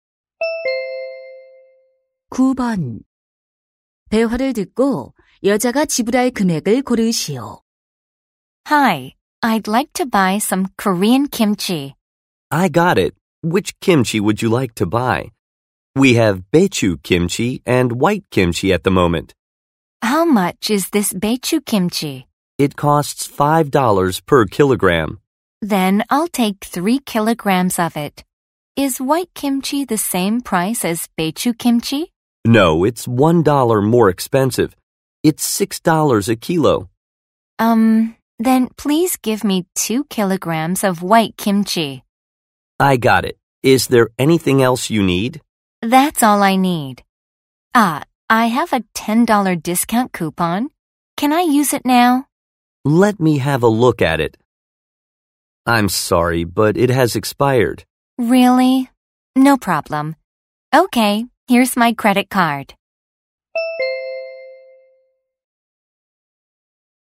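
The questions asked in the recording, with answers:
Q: 대화를 듣고 여자가 지불할 금액을 고르시오.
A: $27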